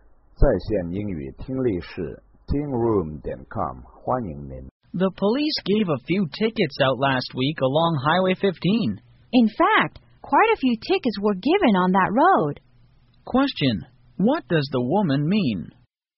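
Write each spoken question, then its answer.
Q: Question, what does the woman mean?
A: Quite a lot of tickets were given out on Highway 15.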